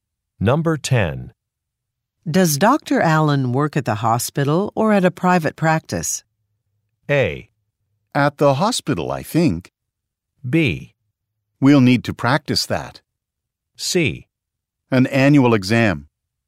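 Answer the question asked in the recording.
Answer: A: At the hospital, I think.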